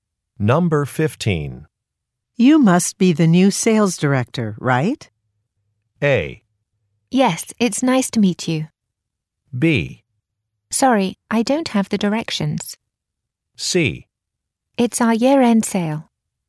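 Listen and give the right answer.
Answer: A: Yes, it's nice to meet you.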